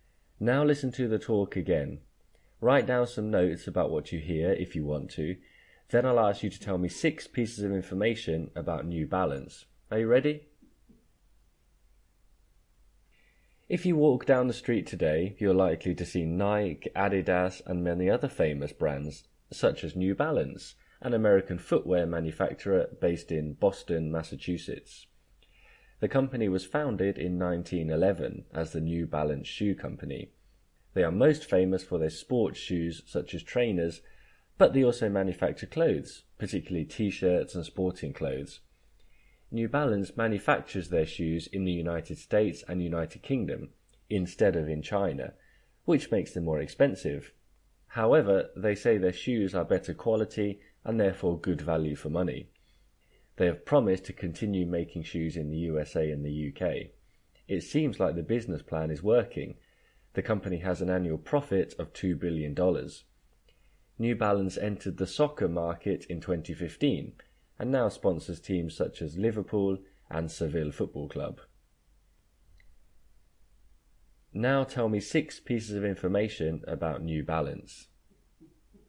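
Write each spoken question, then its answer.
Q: Now tell me 6 pieces of information about New Balance.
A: Based in Boston; founded 1911; famous for sports shoes, also makes clothes; makes shoes in the USA and UK, not China; annual profit $2 billion; entered soccer in 2015 and sponsors Liverpool and Seville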